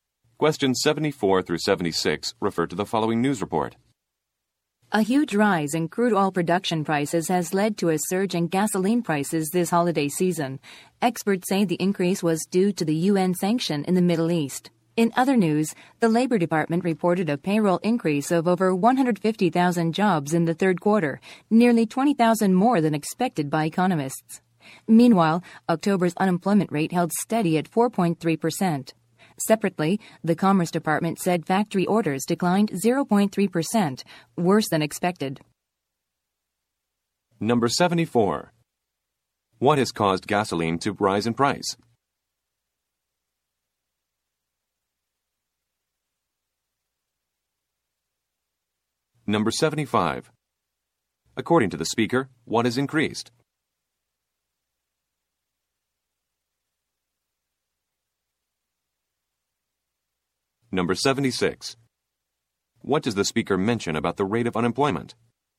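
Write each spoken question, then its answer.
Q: What has caused gasoline to rise in price?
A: A rise in crude oil production prices

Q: According to the speaker, what has increased?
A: Payroll jobs

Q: What does the speaker mention about the rate of unemployment?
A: It held steady at 4.3%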